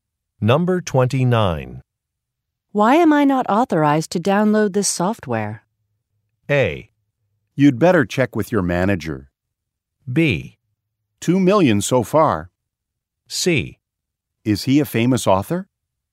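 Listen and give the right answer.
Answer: A: You'd better check with your manager.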